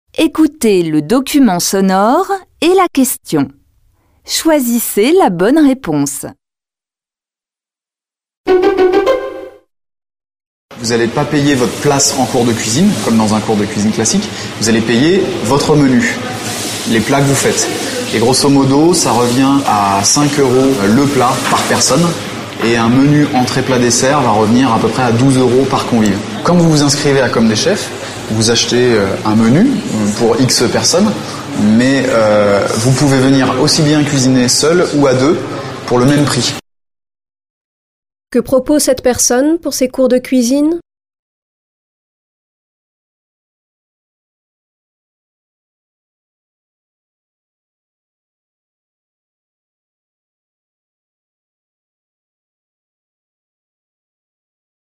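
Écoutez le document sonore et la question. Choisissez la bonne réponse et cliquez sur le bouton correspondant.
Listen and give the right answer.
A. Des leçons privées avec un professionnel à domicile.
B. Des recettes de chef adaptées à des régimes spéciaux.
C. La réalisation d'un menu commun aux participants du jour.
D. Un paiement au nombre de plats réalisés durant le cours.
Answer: D. Un paiement au nombre de plats réalisés durant le cours.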